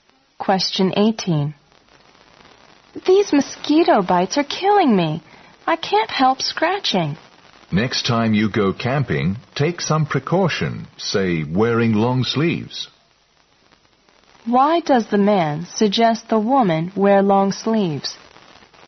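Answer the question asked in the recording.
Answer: To protect herself from mosquito bites.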